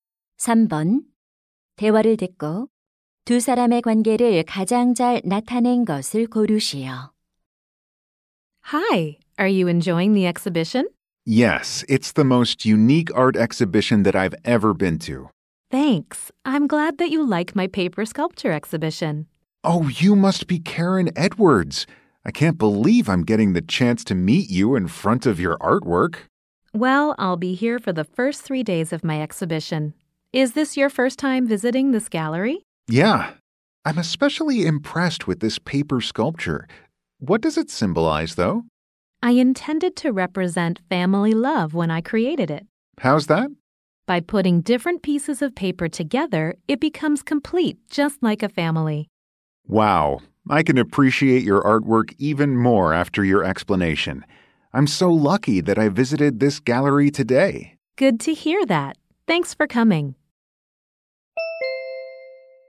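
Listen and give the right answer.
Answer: 조각가와 관람객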